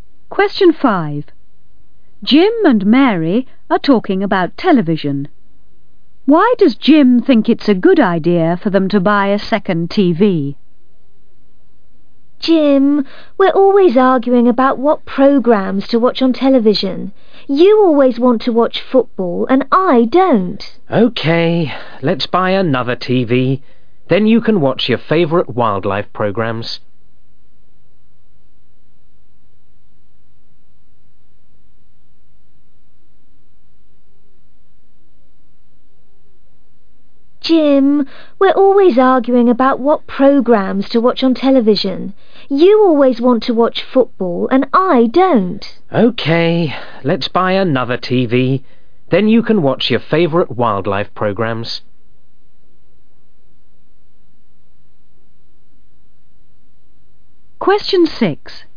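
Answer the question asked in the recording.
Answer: So Mary can watch her favourite wildlife programmes (and they stop arguing)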